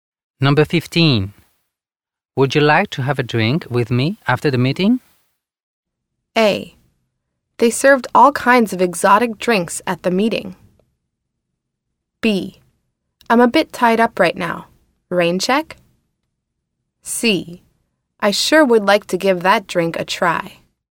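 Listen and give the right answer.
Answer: B: I'm a bit tied up right now. Rain check?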